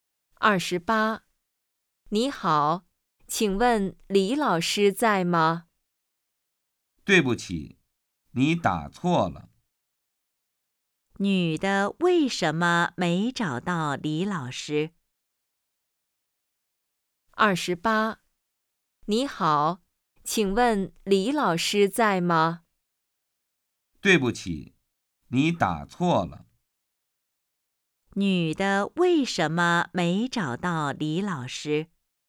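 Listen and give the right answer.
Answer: 电话打错了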